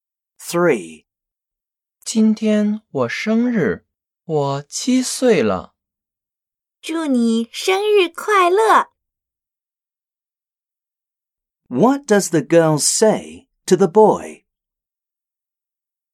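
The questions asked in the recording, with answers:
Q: What does the girl say to the boy?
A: Happy birthday (祝你生日快乐)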